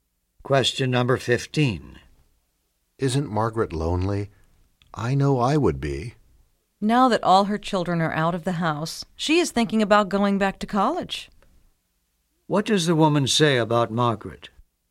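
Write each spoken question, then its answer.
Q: What does the woman say about Margaret?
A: She is thinking about going back to college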